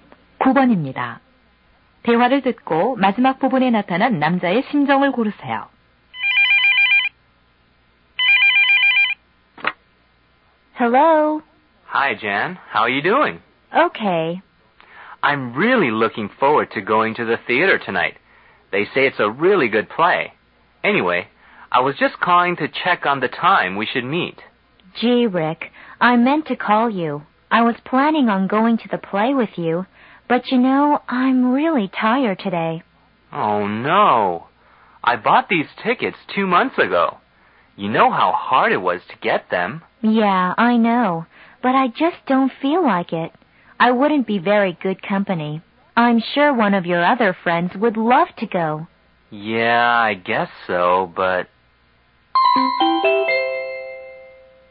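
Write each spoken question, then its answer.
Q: 대화를 듣고 마지막 부분에 나타난 남자의 심정을 고르세요.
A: 실망함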